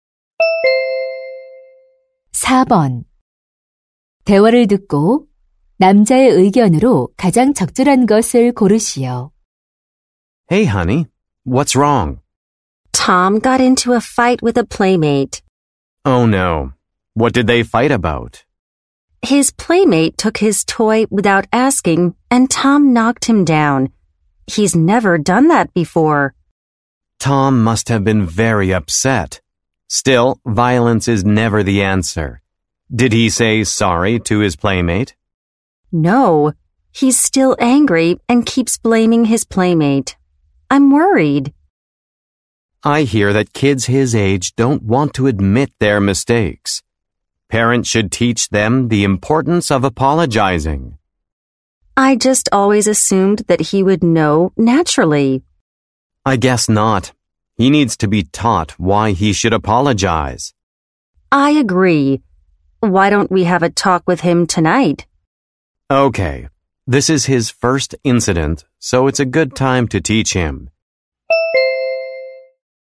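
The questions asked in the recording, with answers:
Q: 대화를 듣고 남자의 의견으로 가장 적절한 것을 고르시오.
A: 부모는 아이에게 사과의 중요성을 가르쳐야 한다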